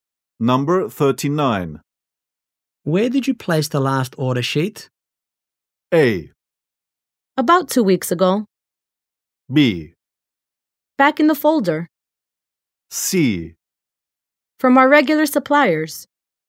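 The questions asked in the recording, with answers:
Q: Where did you place the last order sheet?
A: B: Back in the folder.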